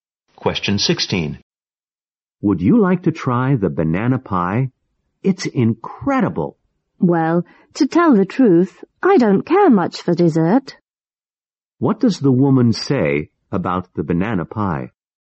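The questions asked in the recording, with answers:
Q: What does the woman say about the banana pie?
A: She doesn't care much for dessert, so she doesn't want to try it.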